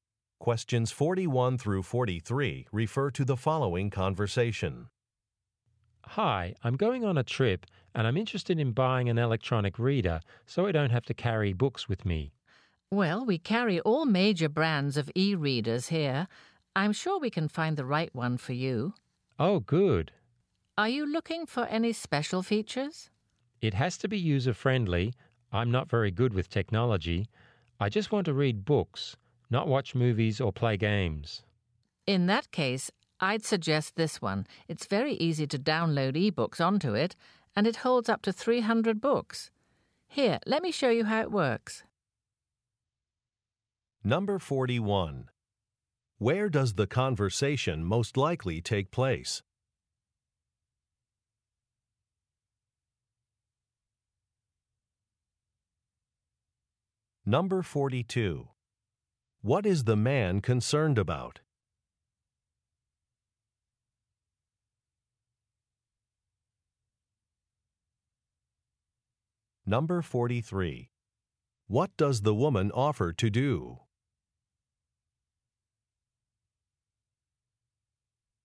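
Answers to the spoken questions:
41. In an electronics store
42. That the e-reader is easy to use (he's not good with technology)
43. Show him how the e-reader works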